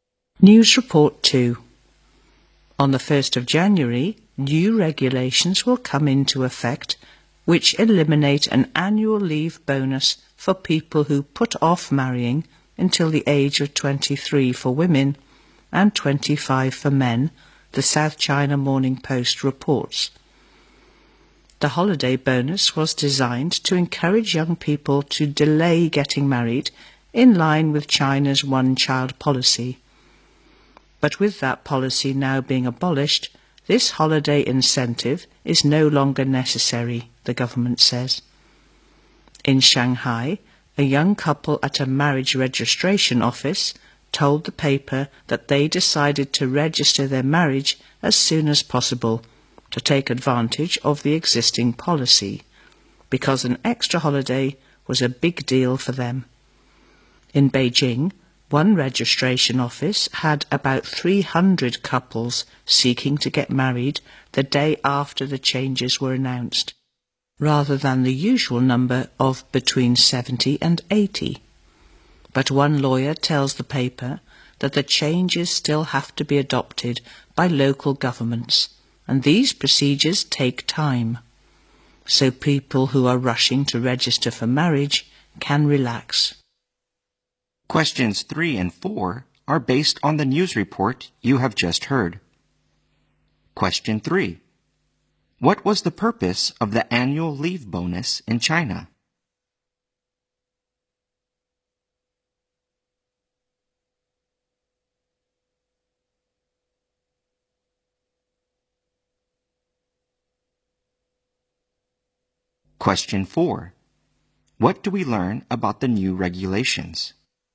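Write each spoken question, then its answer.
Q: What was the purpose of the annual leave bonus in China?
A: To encourage young people to delay getting married.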